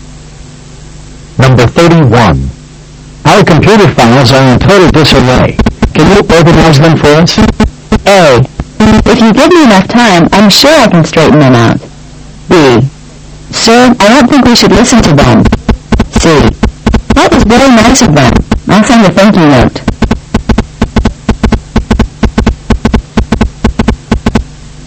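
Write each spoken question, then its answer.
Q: Can you organize them for us?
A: A: If you give me enough time, I'm sure I can straighten them out.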